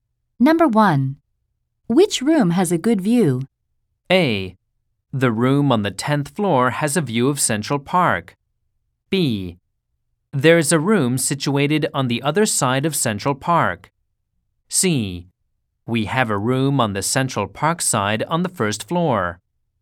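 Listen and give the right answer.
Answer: A: The room on the 10th floor has a view of Central Park.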